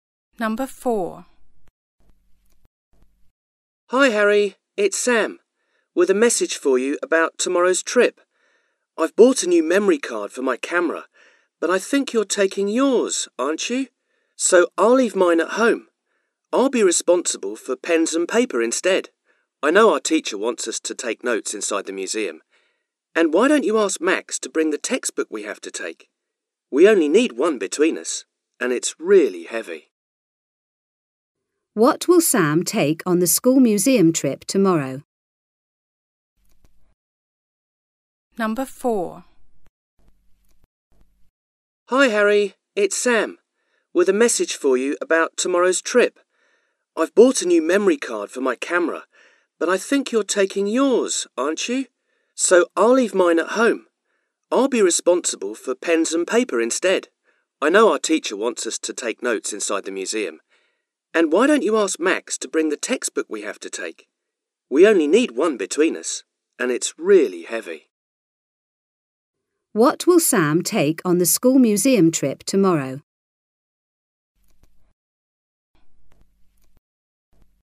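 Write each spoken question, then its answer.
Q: What will Sam take on the school museum trip tomorrow?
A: Pens and paper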